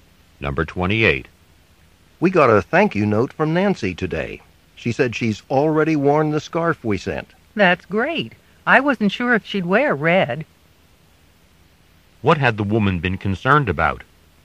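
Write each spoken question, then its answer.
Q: What had the woman been concerned about?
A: Whether Nancy would wear a red scarf.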